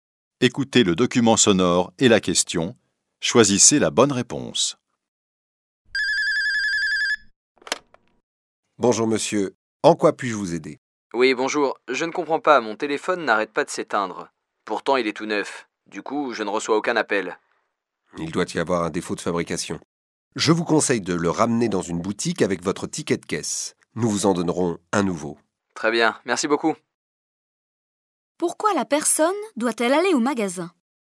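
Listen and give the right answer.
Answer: Pour échanger son téléphone défectueux contre un nouveau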